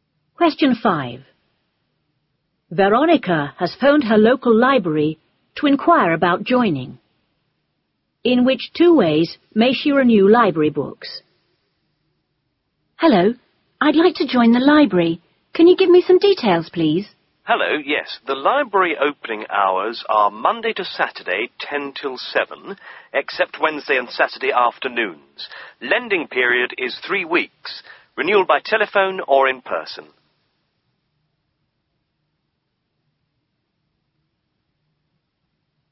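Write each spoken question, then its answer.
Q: In which two ways may she renew library books?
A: By telephone or in person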